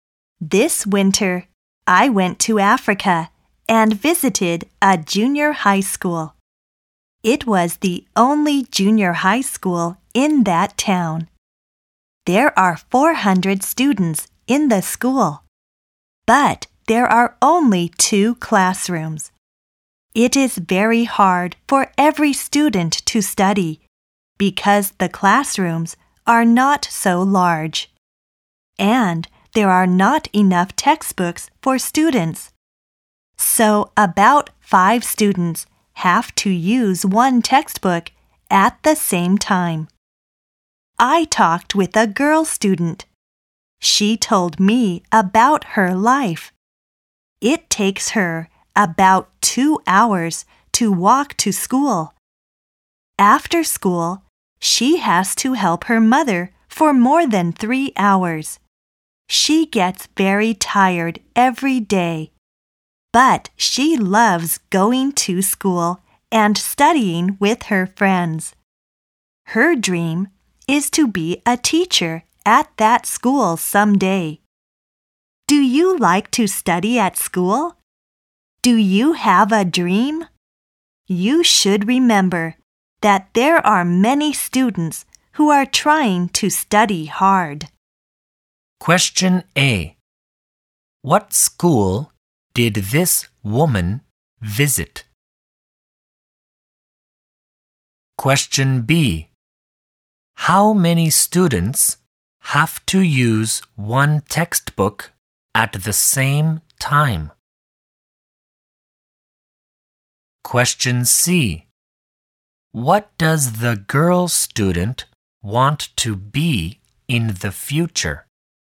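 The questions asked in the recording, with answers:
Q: What school did this woman visit?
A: A junior high school in Africa

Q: How many students have to use 1 textbook at the same time?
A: About 5 students

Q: What does the girl student want to be in the future?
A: A teacher at that school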